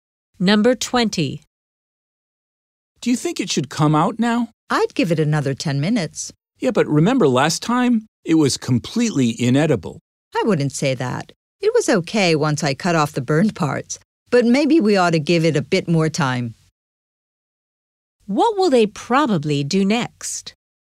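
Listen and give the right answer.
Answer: Leave it in the oven a bit longer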